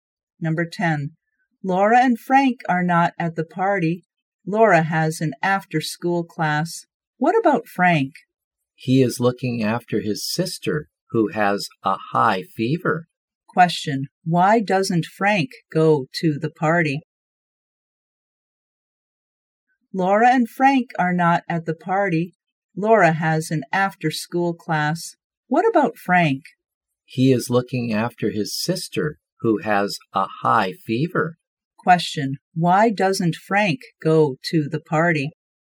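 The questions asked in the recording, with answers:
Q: Why doesn't Frank go to the party?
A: He is looking after his sister, who has a high fever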